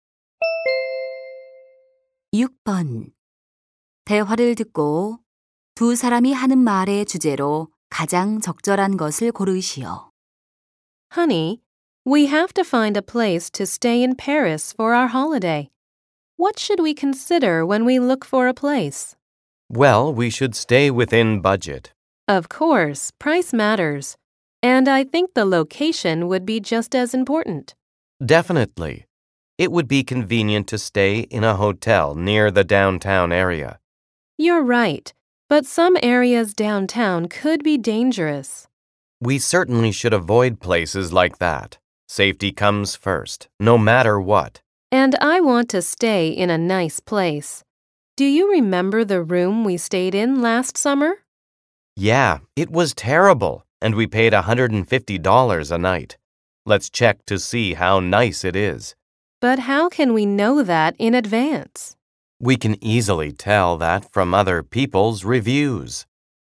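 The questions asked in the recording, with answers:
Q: 대화를 듣고 두 사람이 하는 말의 주제로 가장 적절한 것을 고르시오.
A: 여행 숙소를 고를 때 고려할 점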